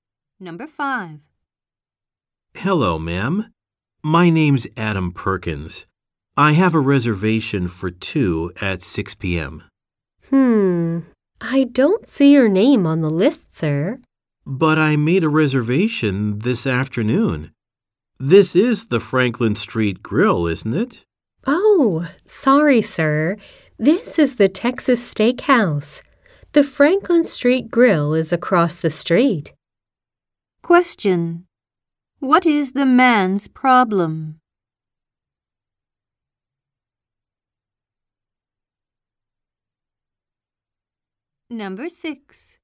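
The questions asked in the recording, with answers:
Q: What is the man's problem?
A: He went to the wrong restaurant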